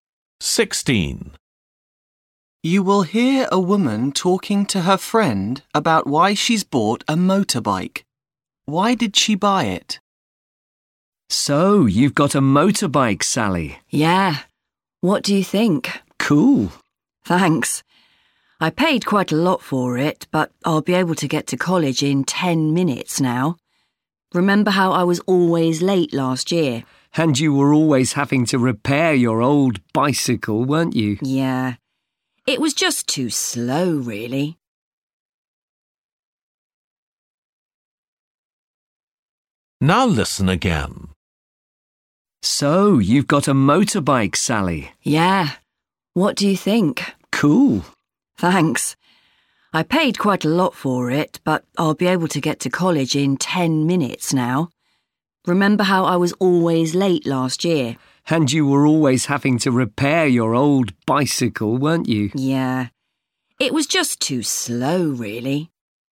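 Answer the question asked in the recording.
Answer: to get to college faster (she was always late)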